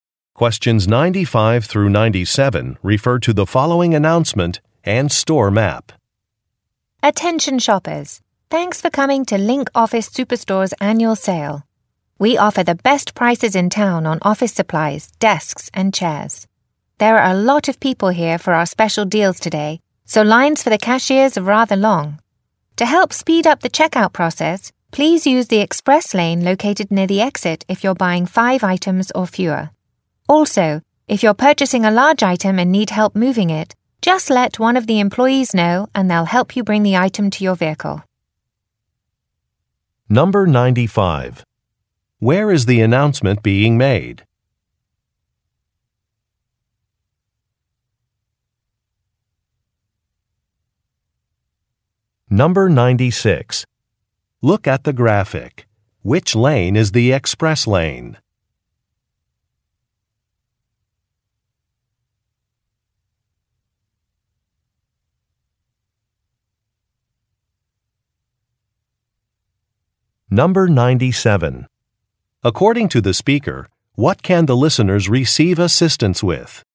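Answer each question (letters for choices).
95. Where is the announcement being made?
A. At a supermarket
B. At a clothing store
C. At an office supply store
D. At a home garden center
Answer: C

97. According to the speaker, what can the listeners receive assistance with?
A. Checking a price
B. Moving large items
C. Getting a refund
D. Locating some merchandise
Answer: B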